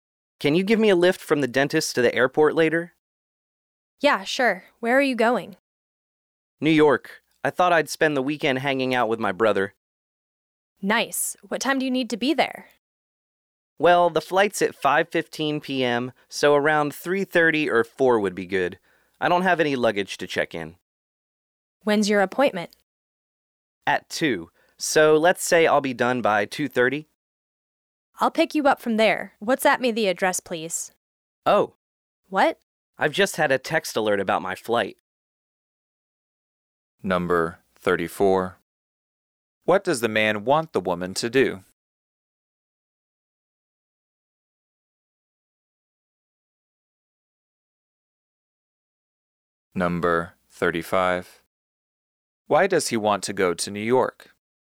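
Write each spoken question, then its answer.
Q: What does the man want the woman to do?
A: Give him a lift from the dentist to the airport

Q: Why does he want to go to New York?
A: To spend the weekend with his brother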